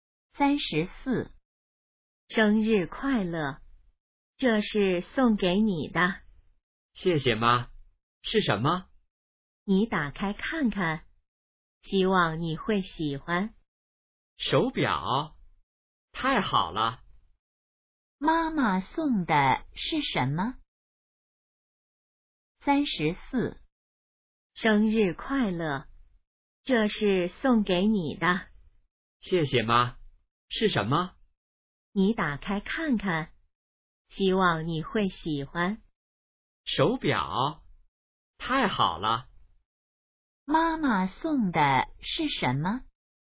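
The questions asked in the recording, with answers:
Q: 妈妈送的是什么?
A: 手表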